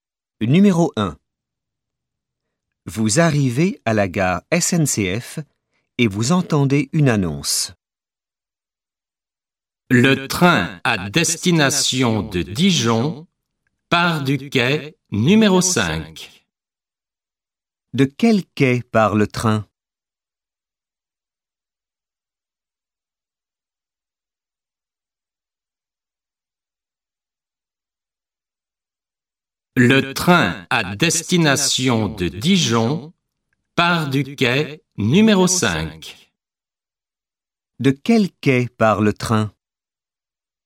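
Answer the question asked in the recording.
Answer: Quai numéro 5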